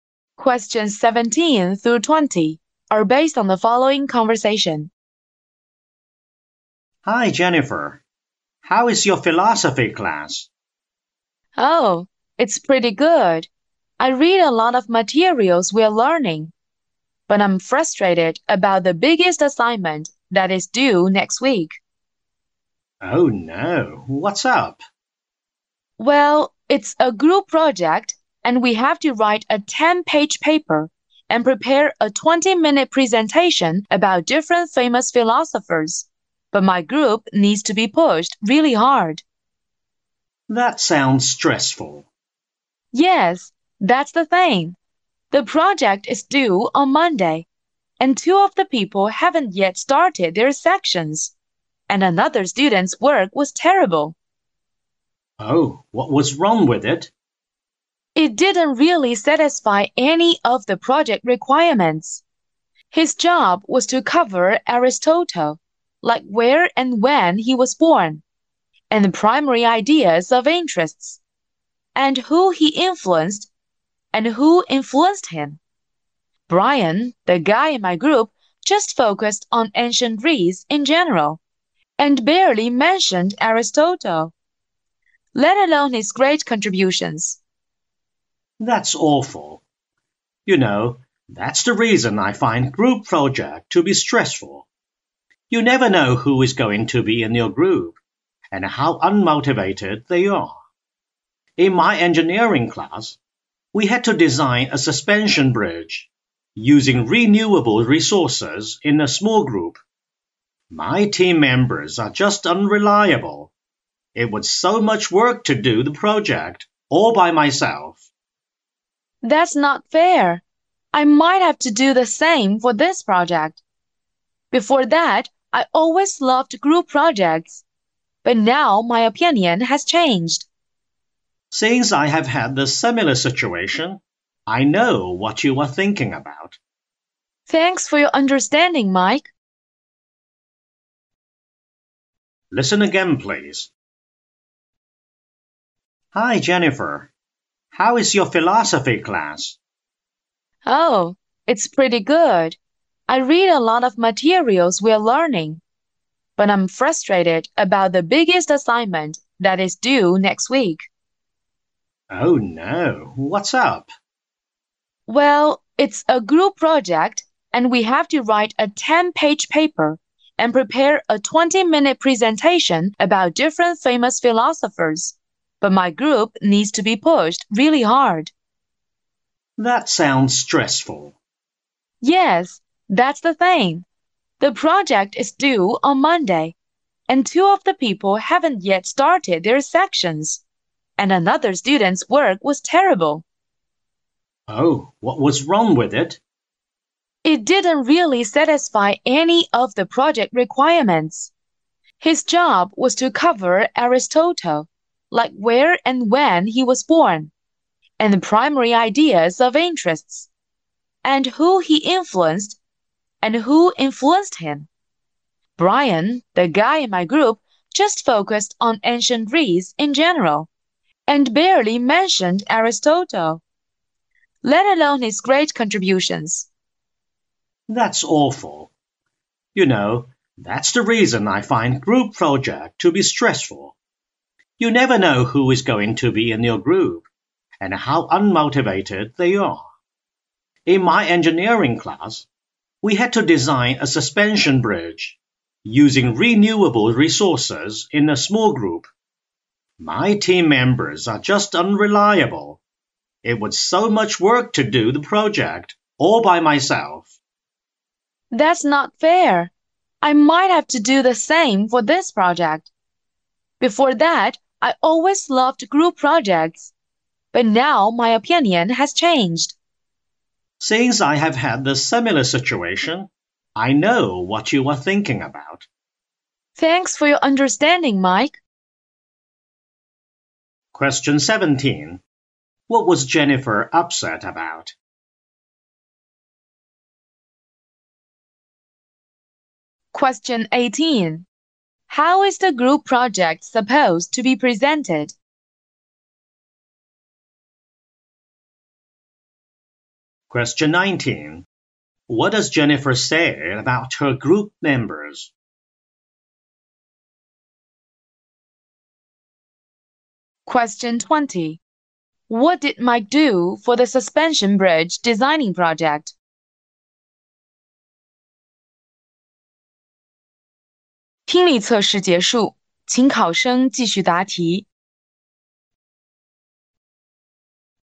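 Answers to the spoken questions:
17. Her group project
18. A 10-page paper and a 20-minute presentation
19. They are unmotivated and need pushing
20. He did it all by himself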